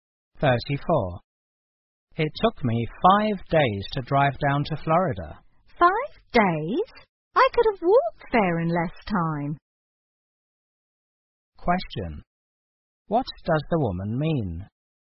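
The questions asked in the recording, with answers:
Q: What does the woman mean?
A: Five days was far too long for the drive.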